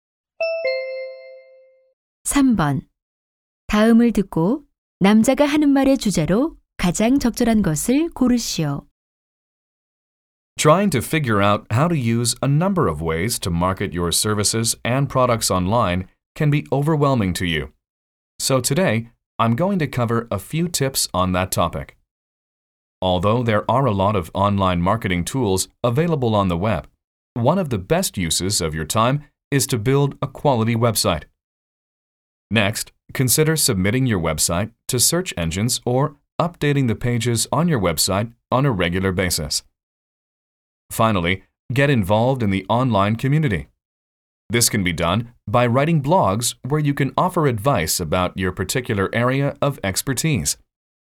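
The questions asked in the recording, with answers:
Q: 다음을 듣고 남자가 하는 말의 주제로 가장 적절한 것을 고르시오.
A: 온라인 마케팅을 위한 몇 가지 팁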